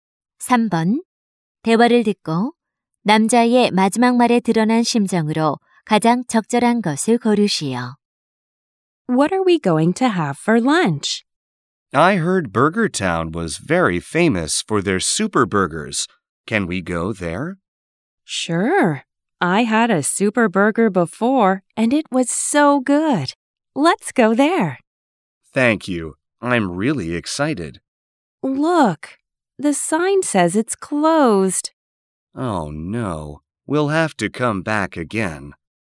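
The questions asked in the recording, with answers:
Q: 대화를 듣고 남자의 마지막 말에 드러난 심정으로 가장 적절한 것을 고르시오.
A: 실망함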